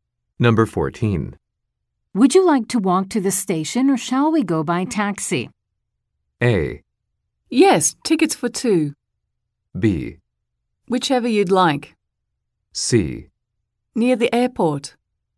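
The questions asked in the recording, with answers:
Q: Would you like to walk to the station or shall we go by taxi?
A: B: Whichever you'd like.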